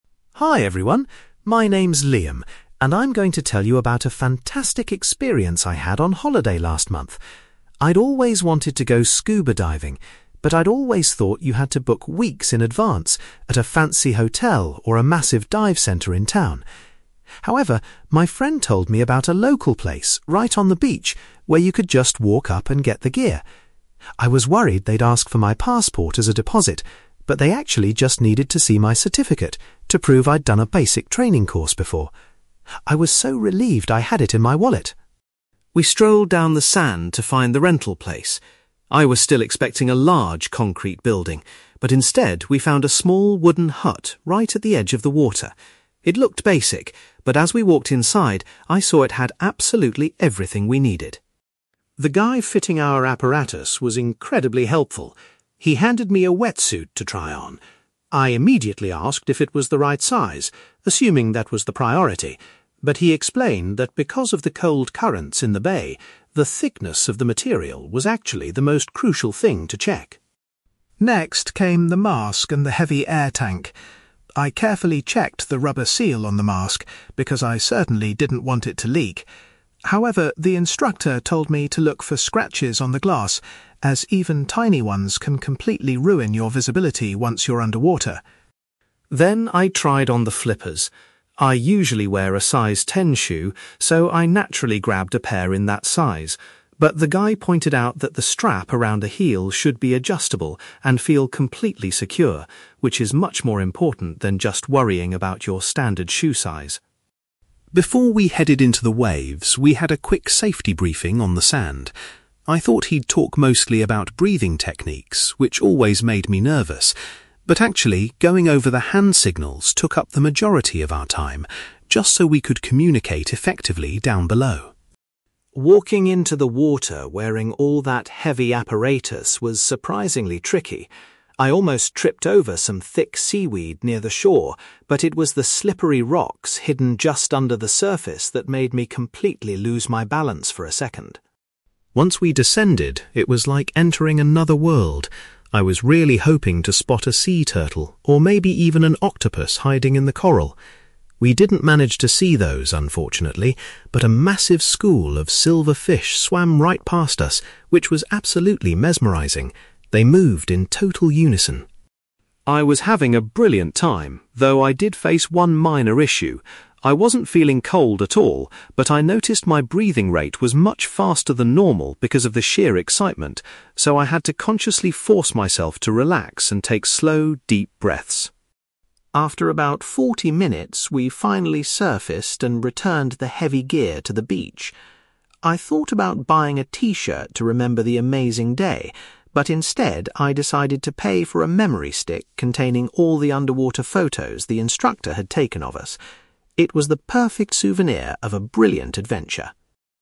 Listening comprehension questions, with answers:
You will hear a young man called Liam talking about renting scuba diving gear on the beach. For questions 9-18, complete the sentences with a word or short phrase.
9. Liam was relieved that he only had to provide a (9)........................... to rent the diving equipment.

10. The place where Liam hired his diving gear was actually a (10)........................... right on the beach.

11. The instructor explained that the (11)........................... of the wetsuit was the most vital detail for the local water conditions.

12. Liam was told to inspect his diving mask for (12)........................... that might affect his vision underwater.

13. The instructor made sure the strap positioned around Liam's (13)........................... was fastened securely.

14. The majority of the safety briefing on the sand was dedicated to practising (14)........................... .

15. As he walked into the sea, Liam almost fell over because of the (15)........................... hidden below the surface.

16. Underwater, Liam was amazed to see a huge group of (16)........................... swimming near him.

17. Because of his excitement, Liam had to try hard to slow down his (17)........................... during the dive.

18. Liam decided to buy a (18)........................... which contained pictures of his underwater adventure.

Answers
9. certificate
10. wooden hut
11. thickness
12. scratches
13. heel
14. hand signals
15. rocks
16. silver fish
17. breathing rate
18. memory stick

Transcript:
Liam: Hi everyone. My name's Liam, and I'm going to tell you about a fantastic experience I had on holiday last month. I'd always wanted to go scuba diving, but I'd always thought you had to book weeks in advance at a fancy hotel or a massive dive centre in town. However, my friend told me about a local place right on the beach where you could just walk up and get the gear. I was worried they'd ask for my passport as a deposit, but they actually just needed to see my certificate to prove I'd done a basic training course before. I was so relieved I had it in my wallet!
We strolled down the sand to find the rental place. I was still expecting a large concrete building, but instead, we found a small wooden hut right at the edge of the water. It looked basic, but as we walked inside, I saw it had absolutely everything we needed.
The guy fitting our apparatus was incredibly helpful. He handed me a wetsuit to try on. I immediately asked if it was the right size, assuming that was the priority. But he explained that because of the cold currents in the bay, the thickness of the material was actually the most crucial thing to check.
Next came the mask and the heavy air tank. I carefully checked the rubber seal on the mask because I certainly didn't want it to leak. However, the instructor told me to look for scratches on the glass, as even tiny ones can completely ruin your visibility once you're underwater.
Then I tried on the flippers. I usually wear a size ten shoe, so I naturally grabbed a pair in that size. But the guy pointed out that the strap around the heel should be adjustable and feel completely secure, which is much more important than just worrying about your standard shoe size.
Before we headed into the waves, we had a quick safety briefing on the sand. I thought he'd talk mostly about breathing techniques, which always made me nervous. But actually, going over the hand signals took up the majority of our time, just so we could communicate effectively down below.
Walking into the water wearing all that heavy apparatus was surprisingly tricky. I almost tripped over some thick seaweed near the shore, but it was the slippery rocks hidden just under the surface that made me completely lose my balance for a second.
Once we descended, it was like entering another world. I was really hoping to spot a sea turtle, or maybe even an octopus hiding in the coral. We didn't manage to see those, unfortunately, but a massive school of silver fish swam right past us, which was absolutely mesmerising. They moved in total unison.
I was having a brilliant time, though I did face one minor issue. I wasn't feeling cold at all, but I noticed my breathing rate was much faster than normal because of the sheer excitement, so I had to consciously force myself to relax and take slow, deep breaths.
After about forty minutes, we finally surfaced and returned the heavy gear to the beach. I thought about buying a t-shirt to remember the amazing day, but instead, I decided to pay for a memory stick containing all the underwater photos the instructor had taken of us. It was the perfect souvenir of a brilliant adventure.

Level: B2